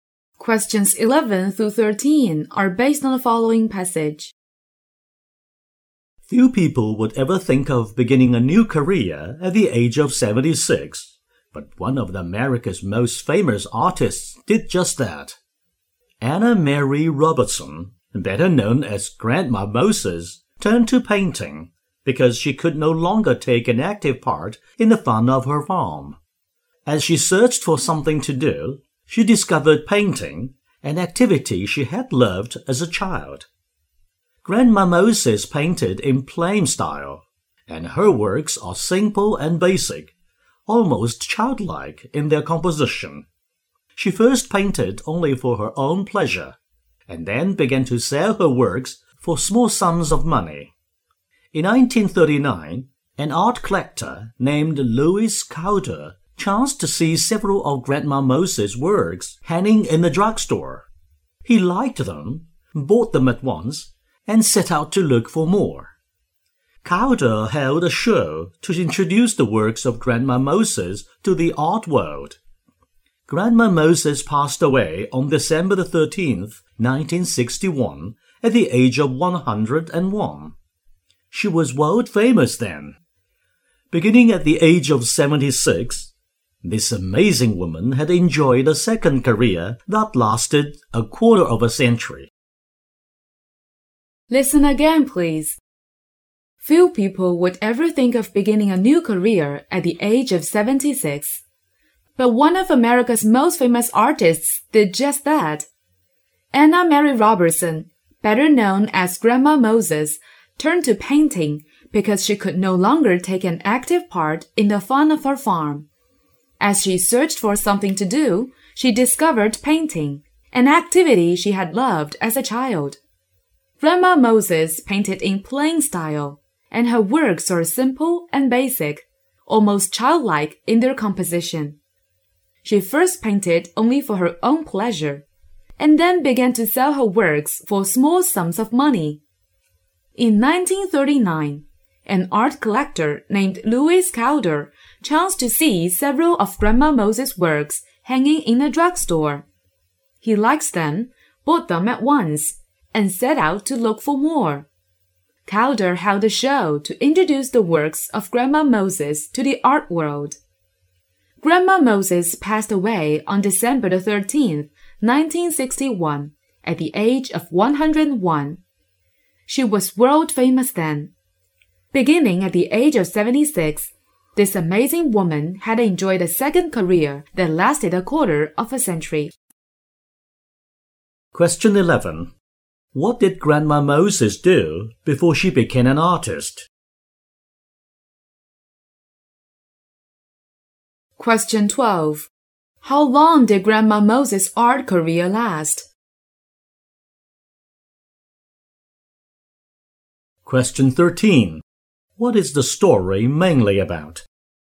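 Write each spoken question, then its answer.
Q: What did Grandma Moses do before she became an artist?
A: She worked on a farm

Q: How long did Grandma Moses' art career last?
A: About 25 years

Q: What is the story mainly about?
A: Grandma Moses beginning a successful art career at 76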